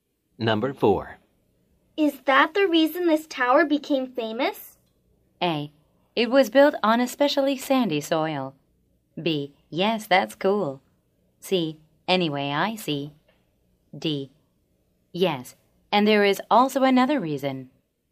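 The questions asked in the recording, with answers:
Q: Is that the reason this tower became famous?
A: D: Yes, and there is also another reason.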